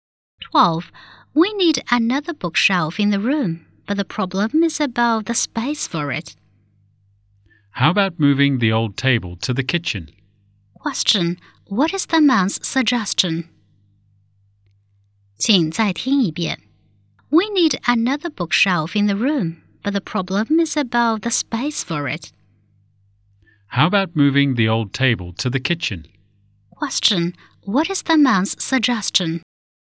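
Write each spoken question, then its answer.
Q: Question. What is the man's suggestion?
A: Move the old table to the kitchen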